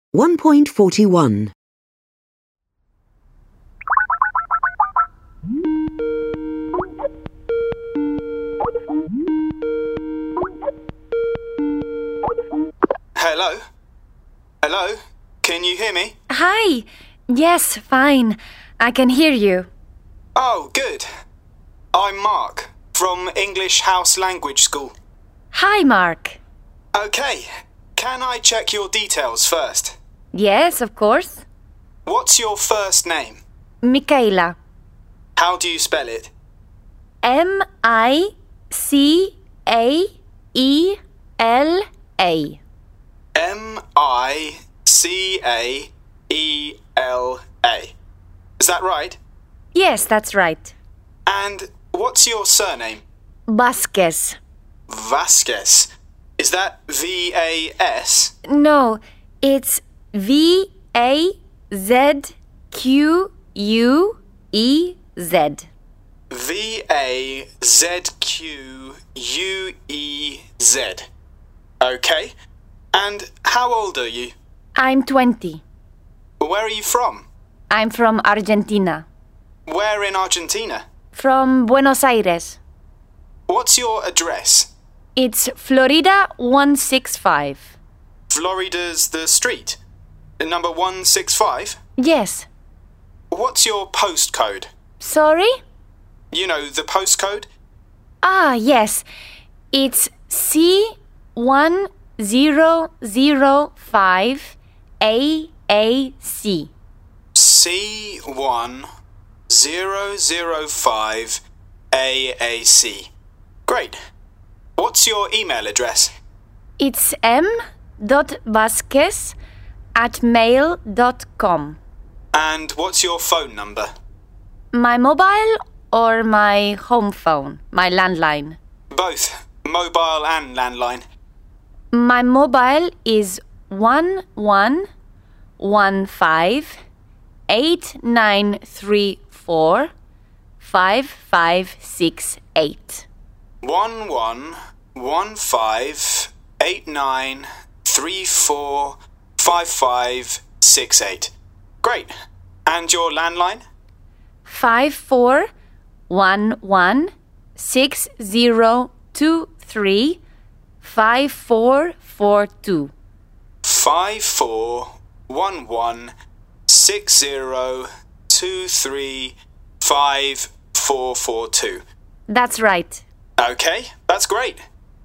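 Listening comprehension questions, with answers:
Listen to the video call. Micaela is a new English student. Mark is asking her for student information. Complete the form.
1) First name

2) Surname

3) Age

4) Country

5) City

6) Address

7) Postcode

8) Email address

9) Phone mobile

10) Phone landline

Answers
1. Micaela
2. Vazquez
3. 20
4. Argentina
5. Buenos Aires
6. Florida 165
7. C1005AAC
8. m.vazquez@mail.com
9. 1115 8934 5568
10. 5411 6023 5442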